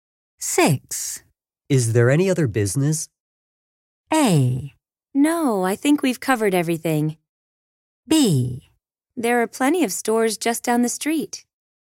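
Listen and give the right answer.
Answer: A: No, I think we've covered everything.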